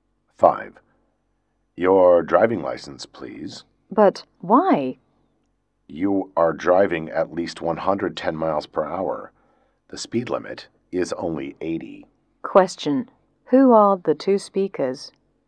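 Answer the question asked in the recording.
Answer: A policeman and a driver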